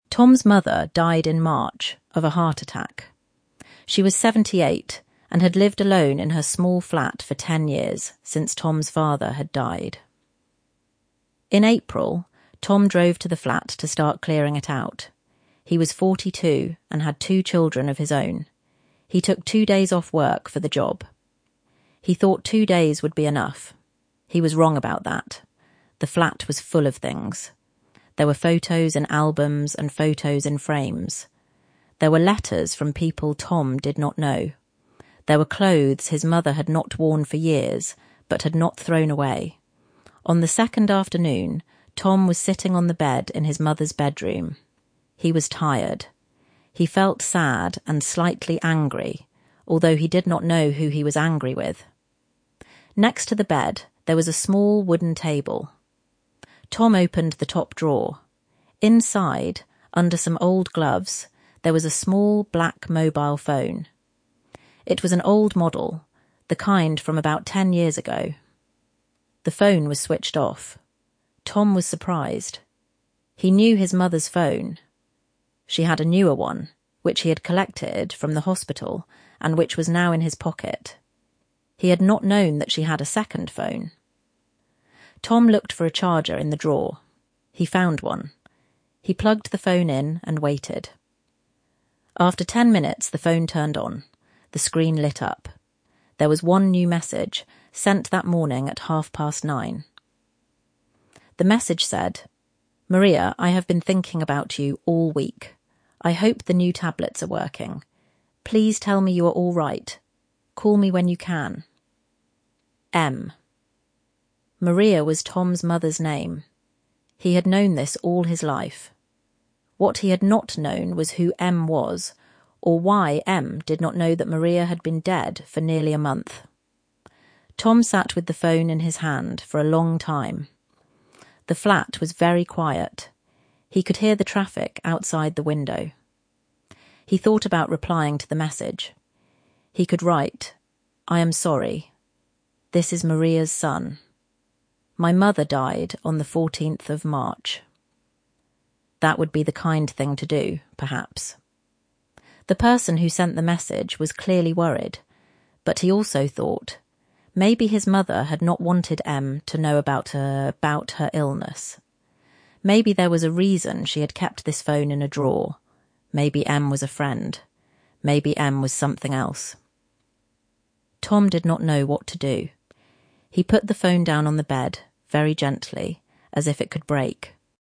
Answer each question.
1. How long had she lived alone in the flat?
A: For ten years, since Tom's father had died.

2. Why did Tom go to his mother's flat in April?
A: To start clearing it out. He took two days off work for the job.

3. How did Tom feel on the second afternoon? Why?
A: He was tired. He felt sad and slightly angry, although he did not know who he was angry with.

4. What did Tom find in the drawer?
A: A small black mobile phone, an old model from about ten years ago.

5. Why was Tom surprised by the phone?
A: He had not known that she had a second phone.

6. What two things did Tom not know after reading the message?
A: He did not know who 'M' was, and he did not know why M did not know that Maria had been dead for nearly a month.

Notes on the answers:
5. Because he knew his mother's phone — the newer one, which he had collected from the hospital and now had in his pocket.

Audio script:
Tom's mother died in March, of a heart attack. She was seventy-eight, and had lived alone in her small flat for ten years, since Tom's father had died.
In April, Tom drove to the flat to start clearing it out. He was forty-two, and had two children of his own. He took two days off work for the job. He thought two days would be enough.
He was wrong about that. The flat was full of things. There were photos in albums and photos in frames. There were letters from people Tom did not know. There were clothes his mother had not worn for years, but had not thrown away.
On the second afternoon, Tom was sitting on the bed in his mother's bedroom. He was tired. He felt sad and slightly angry, although he did not know who he was angry with.
Next to the bed, there was a small wooden table. Tom opened the top drawer. Inside, under some old gloves, there was a small black mobile phone. It was an old model, the kind from about ten years ago. The phone was switched off.
Tom was surprised. He knew his mother's phone — she had a newer one, which he had collected from the hospital and which was now in his pocket. He had not known that she had a second phone.
Tom looked for a charger in the drawer. He found one. He plugged the phone in and waited.
After ten minutes, the phone turned on. The screen lit up. There was one new message, sent that morning at half past nine.
The message said
'Maria, I have been thinking about you all week. I hope the new tablets are working. Please tell me you are all right. Call me when you can. M.'
Maria was Tom's mother's name. He had known this all his life. What he had not known was who 'M' was, or why M did not know that Maria had been dead for nearly a month.
Tom sat with the phone in his hand for a long time. The flat was very quiet. He could hear the traffic outside the window.
He thought about replying to the message. He could write 'I am sorry. This is Maria's son. My mother died on the 14th of March.' That would be the kind thing to do, perhaps. The person who sent the message was clearly worried.
But he also thought
maybe his mother had not wanted M to know about her illness. Maybe there was a reason she had kept this phone in a drawer. Maybe M was a friend. Maybe M was something else.
Tom did not know what to do.
He put the phone down on the bed, very gently, as if it could break.
to empty a place by removing all the things from it
"He drove to the flat to clear it out."